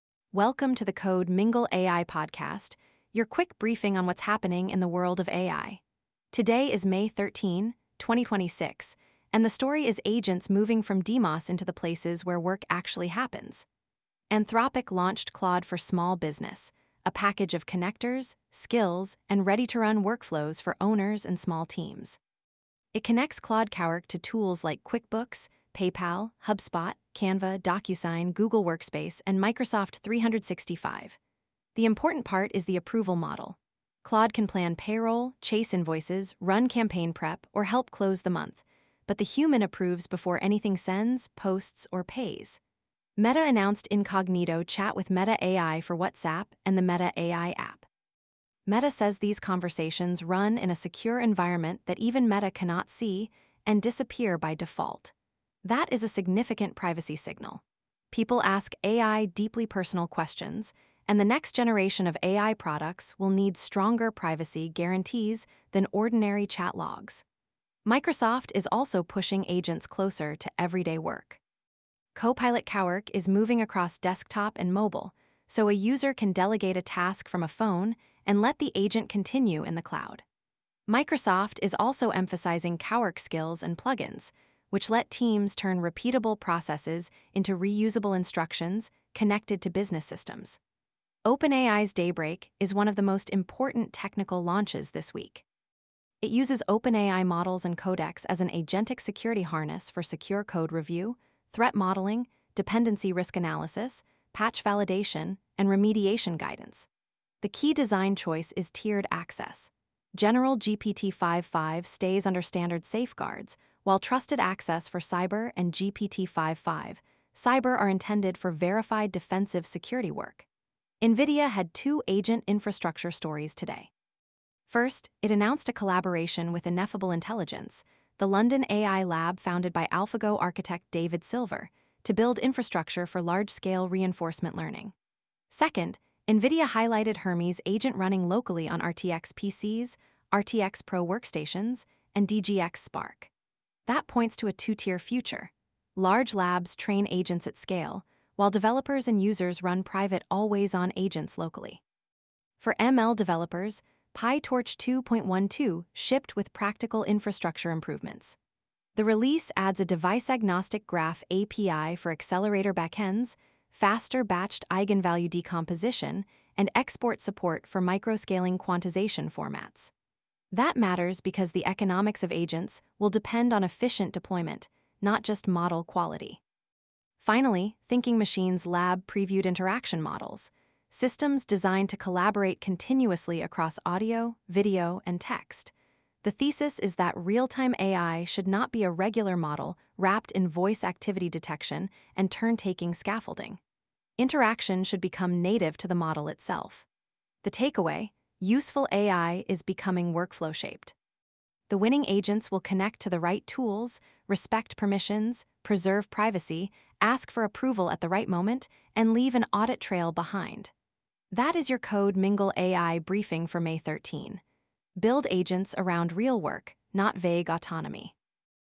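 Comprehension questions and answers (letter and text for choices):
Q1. What is the main product idea behind Claude for Small Business?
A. A general chatbot with no external app access.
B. A package of connectors, skills, and ready-to-run workflows for common small-business tasks.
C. A consumer social network for small-business owners.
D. A replacement accounting system that removes QuickBooks and PayPal.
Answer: B. A package of connectors, skills, and ready-to-run workflows for common small-business tasks.

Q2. Why is Meta's Incognito Chat with Meta AI notable?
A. It makes AI chats public by default.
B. It claims conversations are processed in a secure environment that even Meta cannot access and disappear by default.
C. It only works for advertising campaigns.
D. It removes AI from WhatsApp entirely.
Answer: B. It claims conversations are processed in a secure environment that even Meta cannot access and disappear by default.

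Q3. What does OpenAI Daybreak use Codex for?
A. As an agentic security harness for workflows such as secure code review, threat modeling, patch validation, and remediation guidance.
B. As a video editing tool for marketing teams.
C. As a replacement for all human cybersecurity analysts.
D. As a consumer-only chatbot with no repository access.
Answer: A. As an agentic security harness for workflows such as secure code review, threat modeling, patch validation, and remediation guidance.

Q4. What is one important developer-facing feature in PyTorch 2.12?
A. A device-agnostic graph API for capture and replay across accelerator backends.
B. Removal of model export support.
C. Mandatory use of a single cloud provider.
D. A new social feed inside PyTorch.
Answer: A. A device-agnostic graph API for capture and replay across accelerator backends.

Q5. What is the core thesis behind Thinking Machines Lab's interaction models?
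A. AI should wait for complete prompts before doing anything.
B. Realtime collaboration should be native to the model across audio, video, and text rather than handled mostly by external scaffolding.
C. Voice models should avoid tool use.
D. All AI interaction should be text-only.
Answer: B. Realtime collaboration should be native to the model across audio, video, and text rather than handled mostly by external scaffolding.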